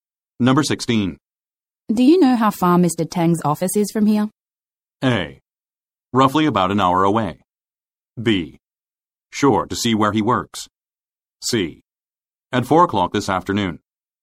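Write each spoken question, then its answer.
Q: Do you know how far Mr. Tang's office is from here?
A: A: Roughly about an hour away.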